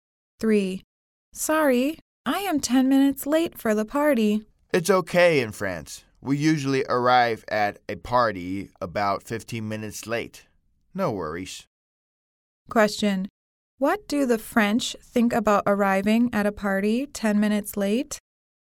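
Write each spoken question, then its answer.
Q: What do the French think about arriving at a party 10 minutes late?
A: It's okay / no problem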